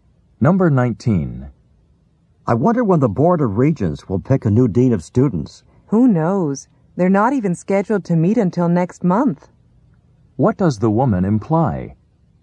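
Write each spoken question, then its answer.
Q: What does the woman imply?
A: A new dean won't be chosen until at least next month.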